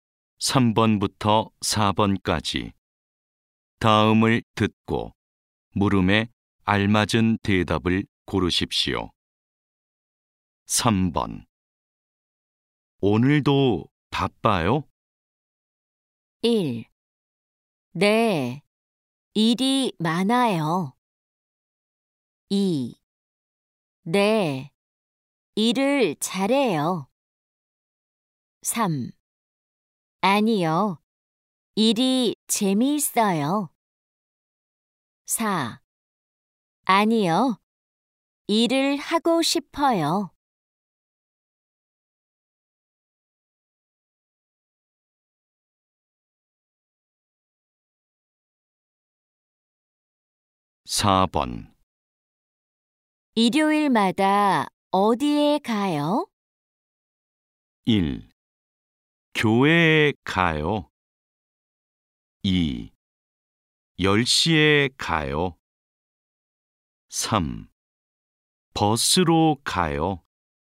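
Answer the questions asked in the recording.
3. 1: 네, 일이 많아요.
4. 1: 교회에 가요.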